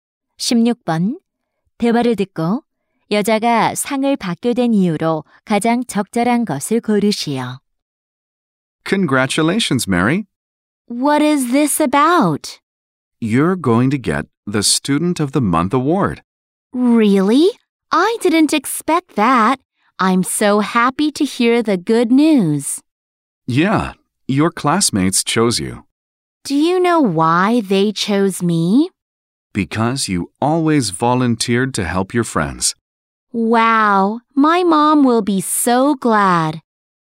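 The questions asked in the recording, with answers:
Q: 대화를 듣고 여자가 상을 받게 된 이유로 가장 적절한 것을 고르시오.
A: 항상 자진해서 친구들을 도와서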